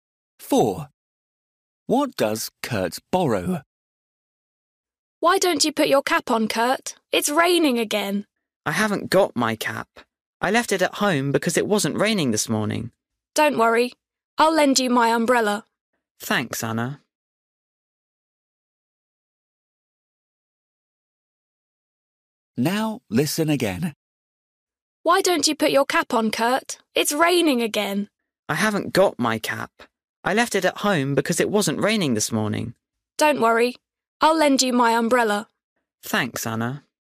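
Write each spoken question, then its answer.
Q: What does Kurt borrow?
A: An umbrella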